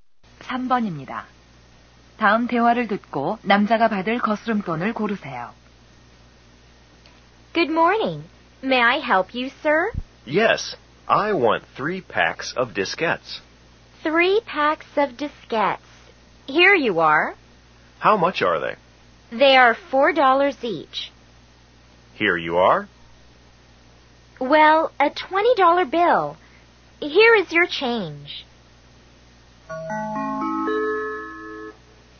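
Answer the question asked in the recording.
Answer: 8달러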